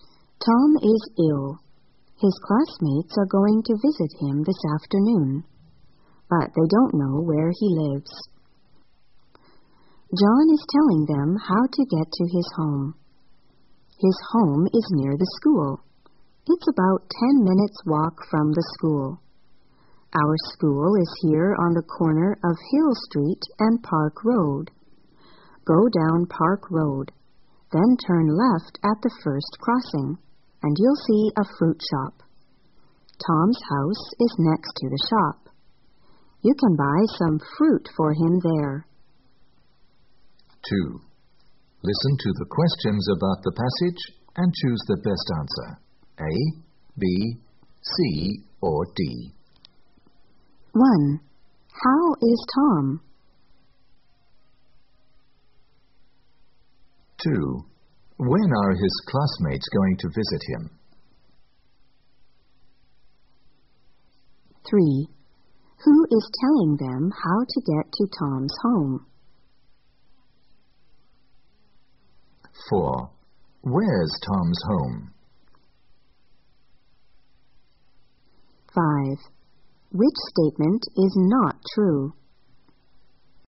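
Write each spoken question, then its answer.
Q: How is Tom?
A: He is ill.

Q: When are his classmates going to visit him?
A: This afternoon.

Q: Who is telling them how to get to Tom's home?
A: John.

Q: Where's Tom's home?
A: Next to the fruit shop, near the school.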